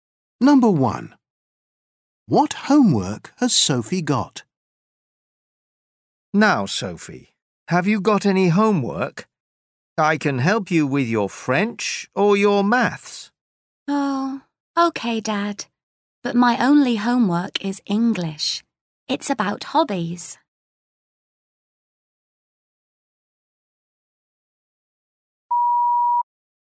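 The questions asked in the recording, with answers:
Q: What homework has Sophie got?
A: English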